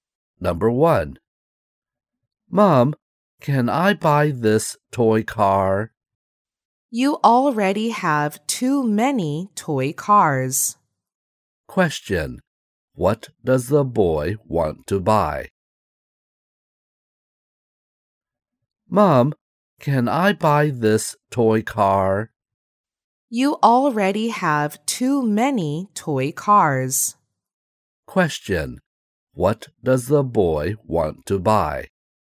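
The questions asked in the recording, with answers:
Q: Question, what does the boy want to buy?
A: A toy car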